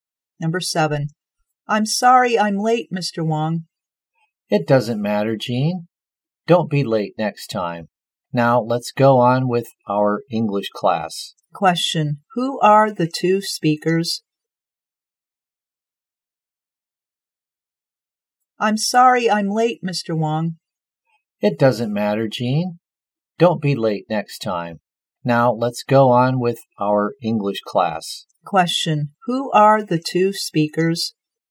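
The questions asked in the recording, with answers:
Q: who are the two speakers?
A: A teacher and a student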